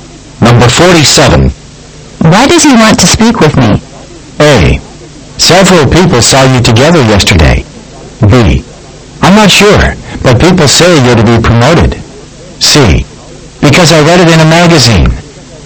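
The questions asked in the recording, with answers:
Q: Why does he want to speak with me?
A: B: I'm not sure, but people say you're to be promoted.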